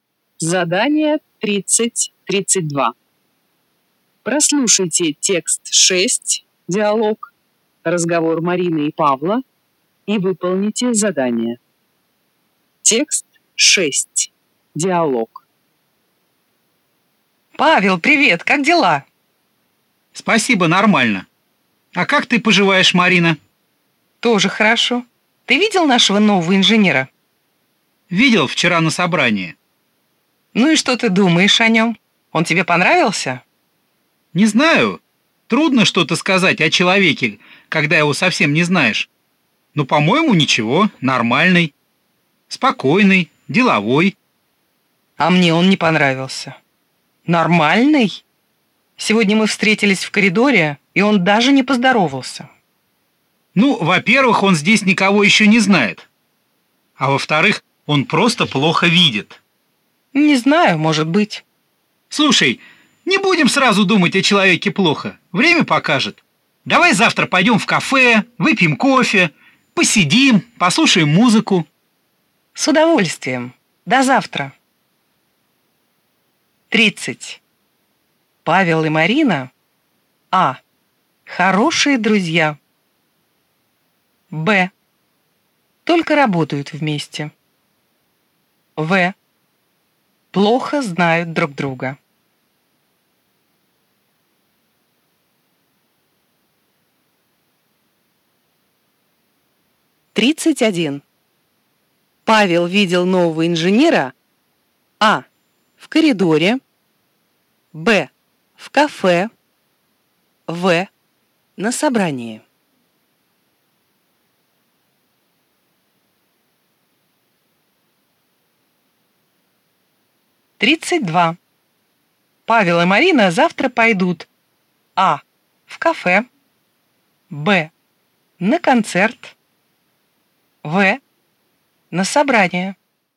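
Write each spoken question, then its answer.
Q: Павел видел нового инженера А. в коридоре, Б. в кафе, В. на собрании.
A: В: на собрании

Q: Павел и Марина завтра пойдут А. в кафе, Б. на концерт, В. на собрание.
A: А: в кафе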